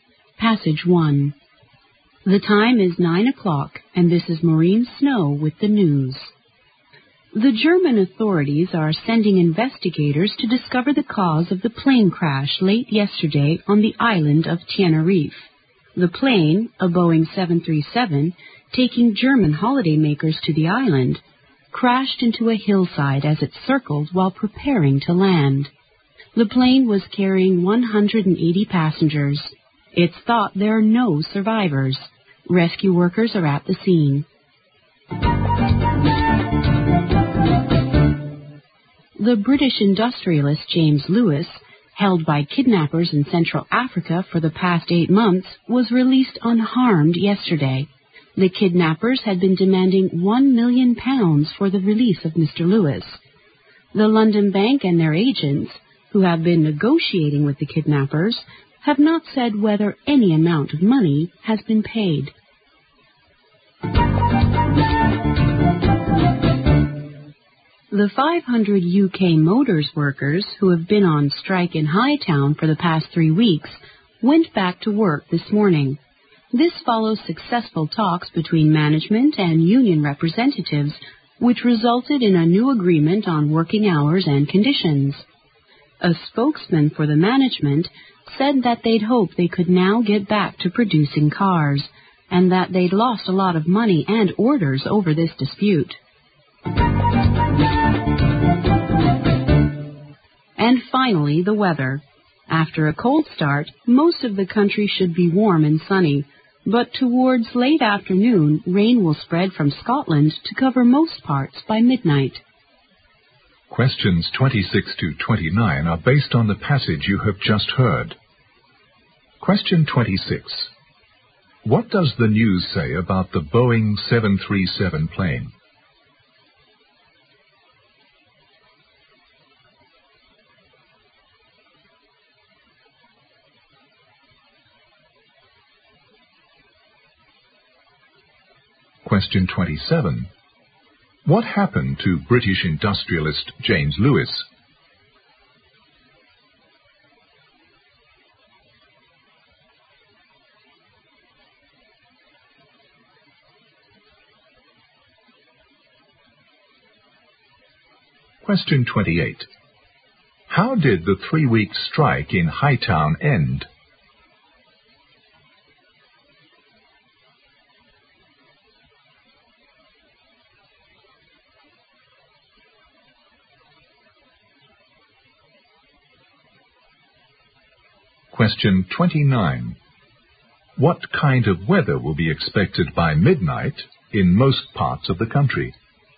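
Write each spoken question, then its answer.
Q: What does the news say about the Boeing 737 plane?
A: It crashed into a hillside on Tenerife, and there are thought to be no survivors.

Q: What happened to British industrialist James Lewis?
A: He was released unharmed after being held by kidnappers for 8 months.

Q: How did the 3-week strike in Hightown end?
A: A new agreement on working hours and conditions was reached.

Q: What kind of weather will be expected by midnight in most parts of the country?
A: Rain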